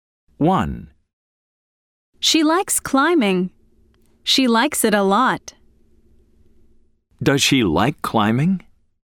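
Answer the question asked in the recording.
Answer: Yes, she does.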